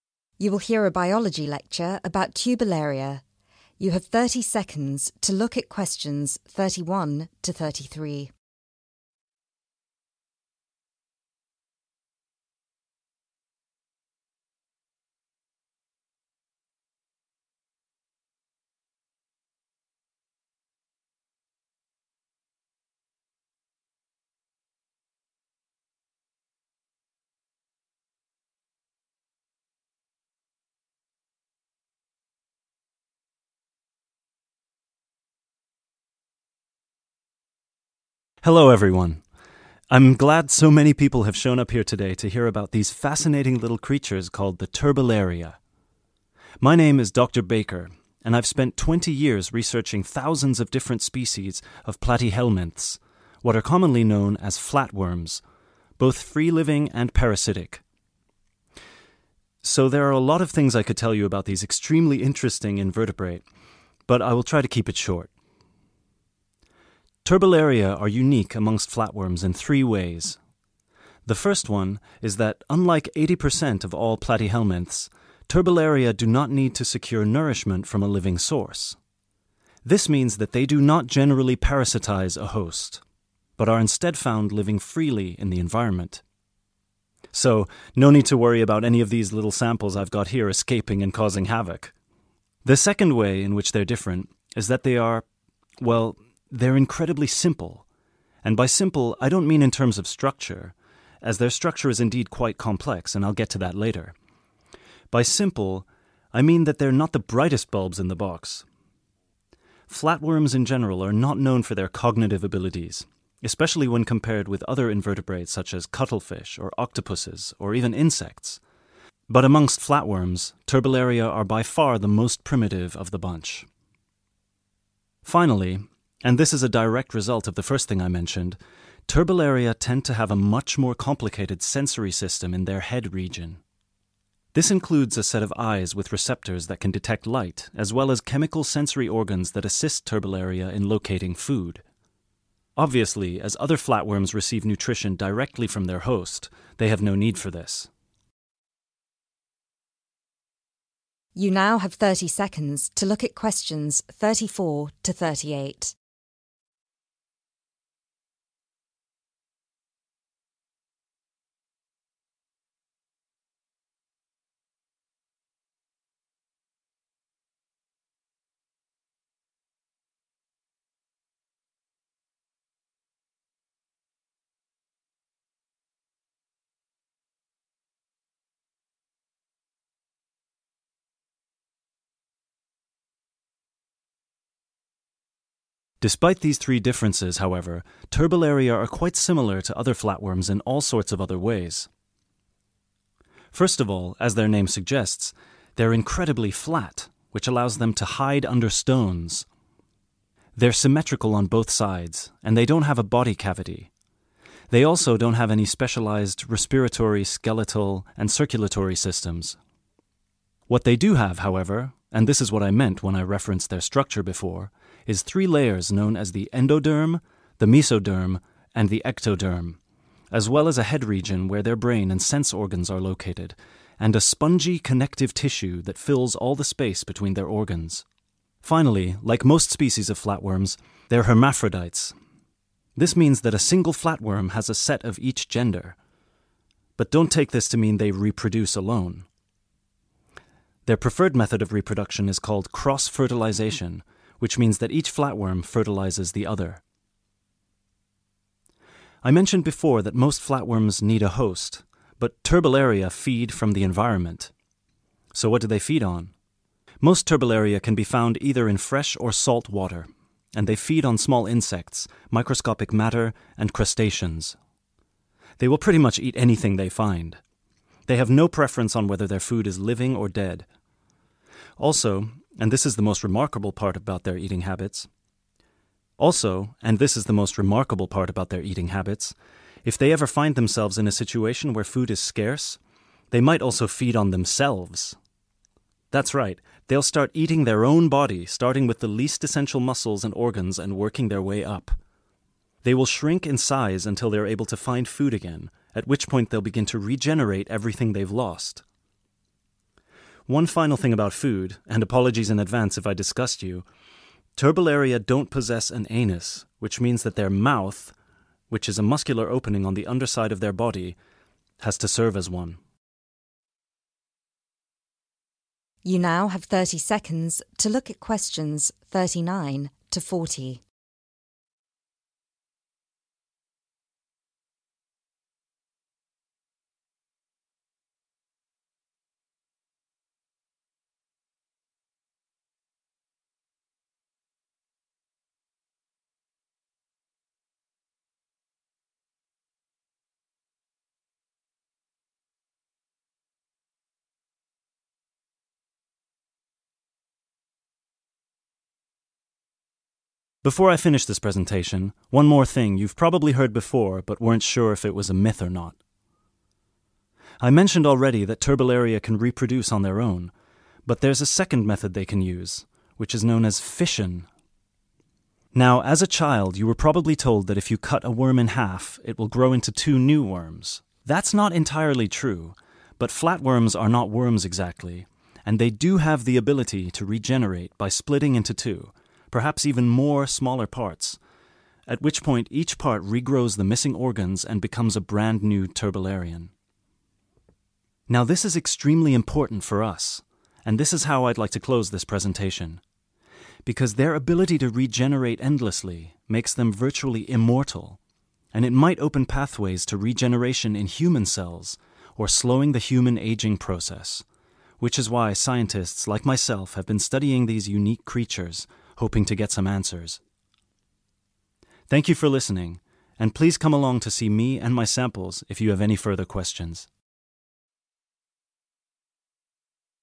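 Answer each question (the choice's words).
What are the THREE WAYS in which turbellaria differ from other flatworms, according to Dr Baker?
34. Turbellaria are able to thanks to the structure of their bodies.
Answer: hide under stones

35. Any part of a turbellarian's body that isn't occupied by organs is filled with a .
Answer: spongy connective tissue

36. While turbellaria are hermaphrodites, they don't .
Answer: reproduce alone

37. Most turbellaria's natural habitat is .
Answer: fresh or salt water

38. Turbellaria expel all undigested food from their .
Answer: mouth

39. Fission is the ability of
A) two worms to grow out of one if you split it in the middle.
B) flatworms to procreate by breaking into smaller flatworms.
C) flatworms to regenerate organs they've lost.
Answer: flatworms to procreate by breaking into smaller flatworms.

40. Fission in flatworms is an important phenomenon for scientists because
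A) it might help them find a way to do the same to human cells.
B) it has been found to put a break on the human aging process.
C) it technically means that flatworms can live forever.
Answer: it might help them find a way to do the same to human cells.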